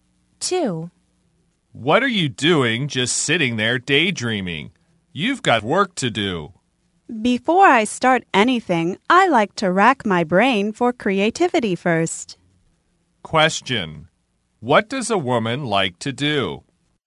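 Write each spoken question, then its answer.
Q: What does a woman like to do?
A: Rack her brain for creativity before starting anything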